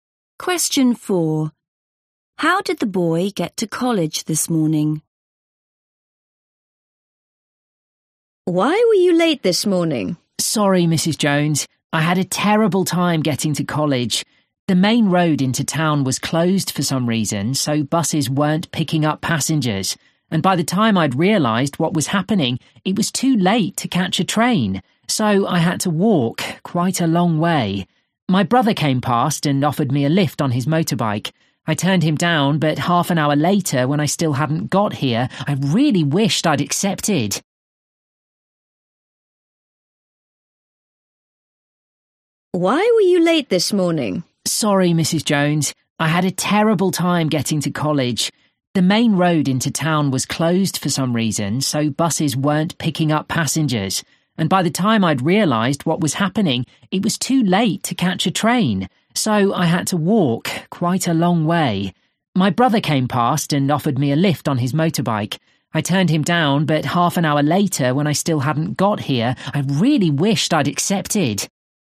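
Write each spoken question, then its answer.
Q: How did the boy get to college this morning?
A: he walked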